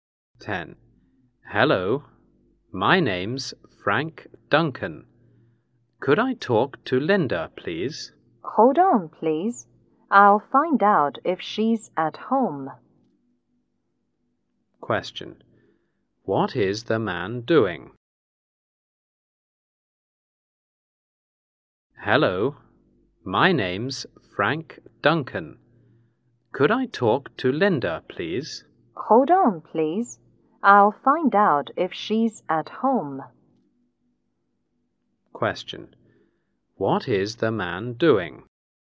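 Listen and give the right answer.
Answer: Making a phone call to talk to Linda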